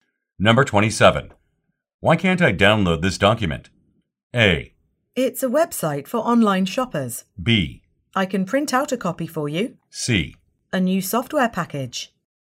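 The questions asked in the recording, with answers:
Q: Why can't I download this document?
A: B: I can print out a copy for you.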